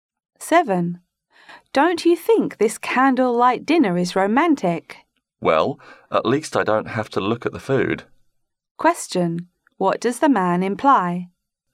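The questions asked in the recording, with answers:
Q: What does the man imply?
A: The food doesn't look good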